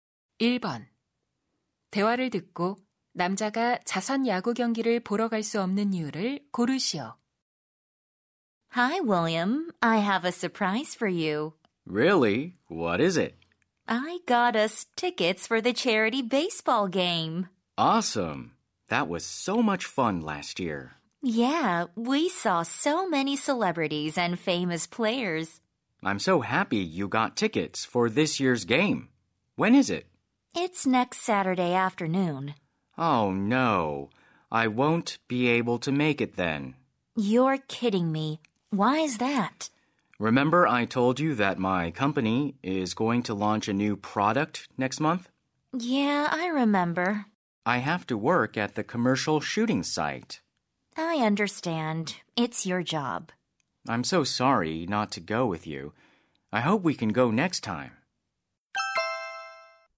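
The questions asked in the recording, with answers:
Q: 대화를 듣고 남자가 자선 야구 경기를 보러 갈 수 없는 이유를 고르시오.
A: 광고 촬영 현장에서 일해야 해서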